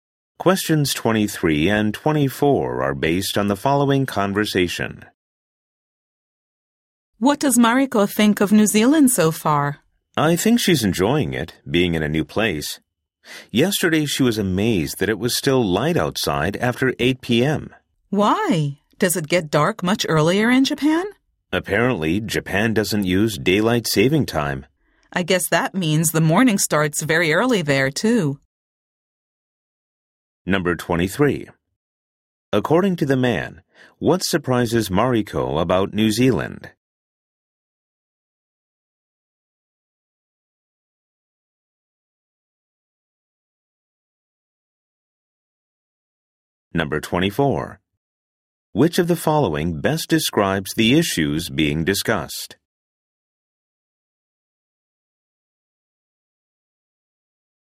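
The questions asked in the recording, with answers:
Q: According to the man, what surprises Mariko about New Zealand?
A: It is still light after 8 p.m.

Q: Which of the following best describes the issues being discussed?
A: Daylight saving time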